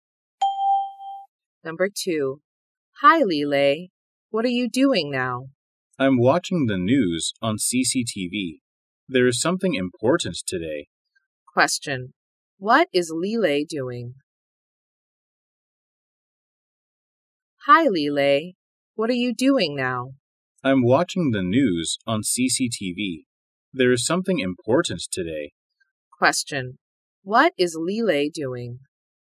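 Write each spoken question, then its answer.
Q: What is Lele doing?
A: Watching the news on CCTV.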